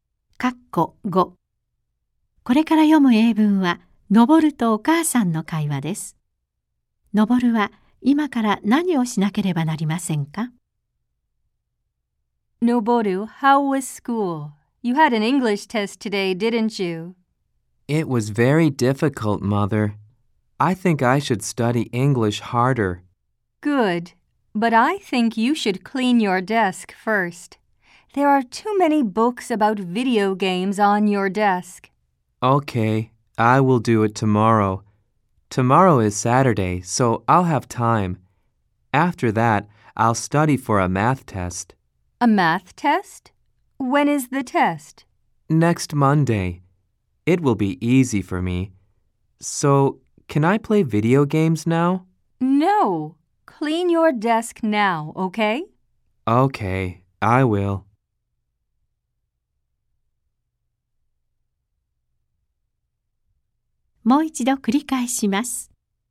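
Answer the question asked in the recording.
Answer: 机を片付けること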